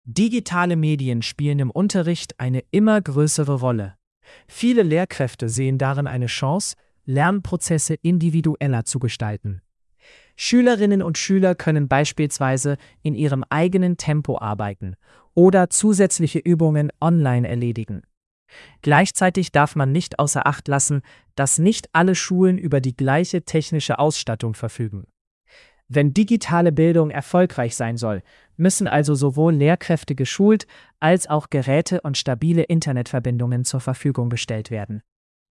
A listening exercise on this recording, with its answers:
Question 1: Was ist die Hauptaussage?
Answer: Digitale Bildung bietet Chancen, braucht aber gute Voraussetzungen.

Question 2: Welcher Vorteil wird genannt?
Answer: Schülerinnen und Schüler können im eigenen Tempo arbeiten.

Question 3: Welches Problem wird erwähnt?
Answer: Nicht alle Schulen haben die gleiche technische Ausstattung.

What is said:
Digitale Medien spielen im Unterricht eine immer größere Rolle. Viele Lehrkräfte sehen darin eine Chance, Lernprozesse individueller zu gestalten. Schülerinnen und Schüler können beispielsweise in ihrem eigenen Tempo arbeiten oder zusätzliche Übungen online erledigen. Gleichzeitig darf man nicht außer Acht lassen, dass nicht alle Schulen über die gleiche technische Ausstattung verfügen. Wenn digitale Bildung erfolgreich sein soll, müssen also sowohl Lehrkräfte geschult als auch Geräte und stabile Internetverbindungen zur Verfügung gestellt werden.

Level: C1-Niveau